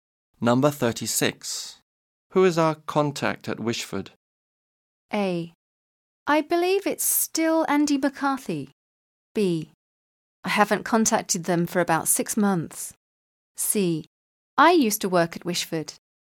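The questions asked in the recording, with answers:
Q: Who is our contact at Wishford?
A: A: I believe it's still Andy McCarthy.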